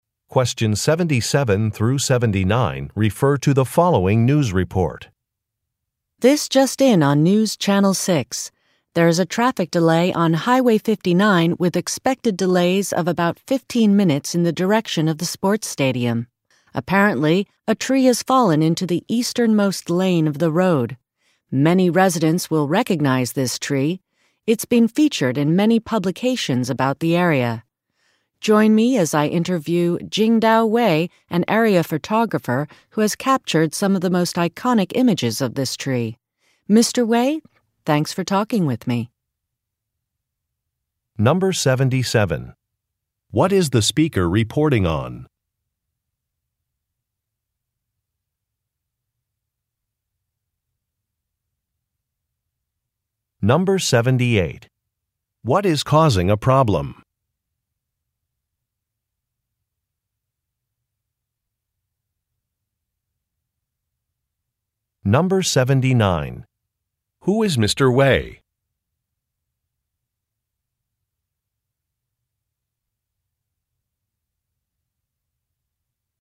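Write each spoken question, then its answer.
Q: What is the speaker reporting on?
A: A traffic delay on Highway 59

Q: What is causing a problem?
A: A fallen tree in the road

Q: Who is Mr. Wei?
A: A local photographer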